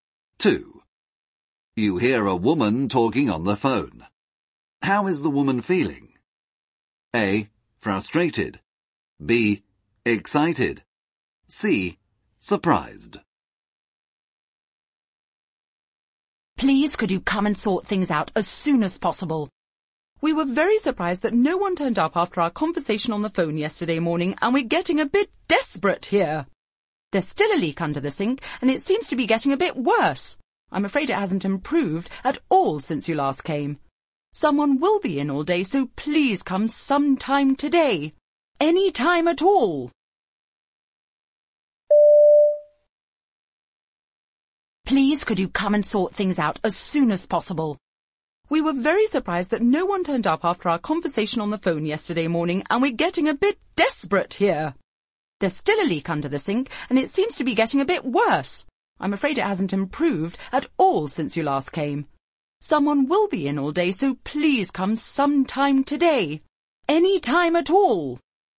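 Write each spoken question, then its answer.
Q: How is the woman feeling?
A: A: Frustrated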